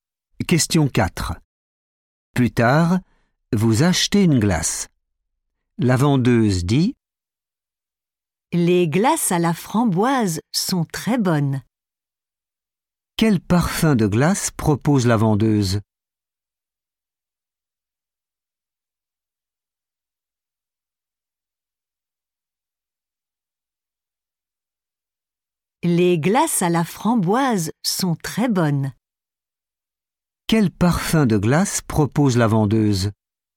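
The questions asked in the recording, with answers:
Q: Quel parfum de glace propose la vendeuse?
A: framboise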